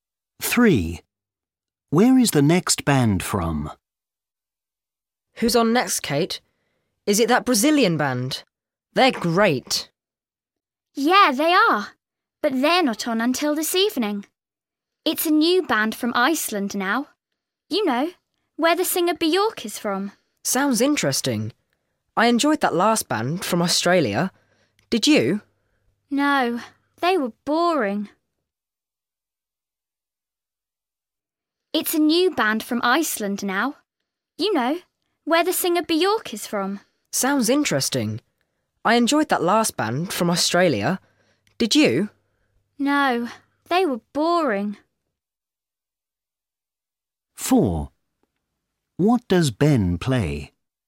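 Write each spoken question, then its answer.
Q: Where is the next band from?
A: Iceland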